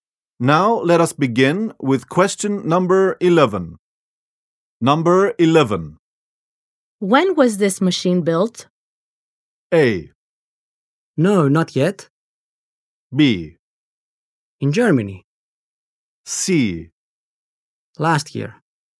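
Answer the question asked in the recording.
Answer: C: Last year.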